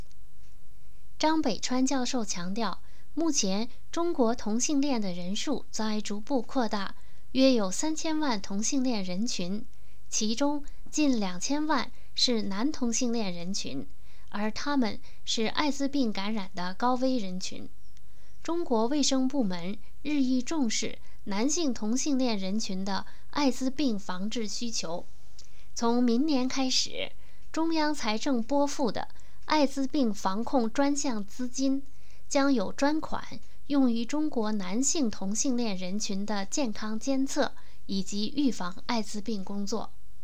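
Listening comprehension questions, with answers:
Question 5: 中国卫生部门将为男性同性恋人群的艾滋病防治做什么?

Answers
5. 从明年开始,中央财政艾滋病防控专项资金将有专款用于男性同性恋人群的健康监测和预防艾滋病工作

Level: 3rd Year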